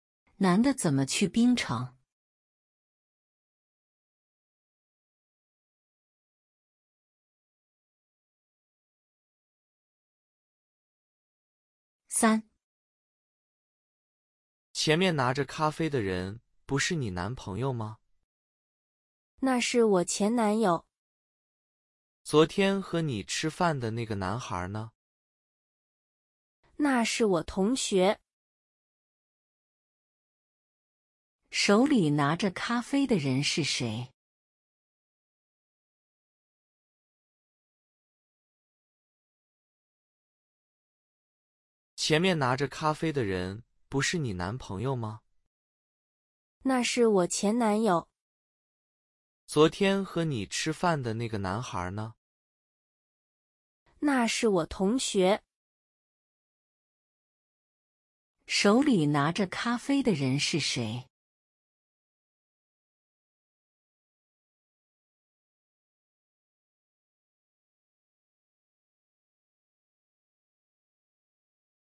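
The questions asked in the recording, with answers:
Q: 手里拿着咖啡的人是谁?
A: 女的前男友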